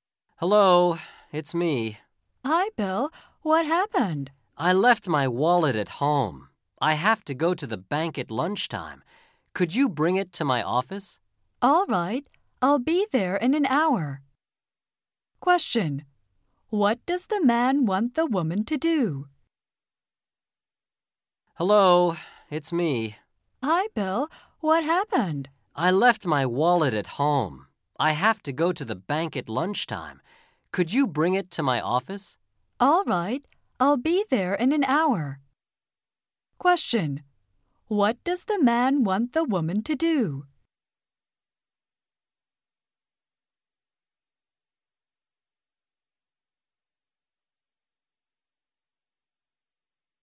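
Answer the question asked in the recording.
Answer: Bring his wallet to his office.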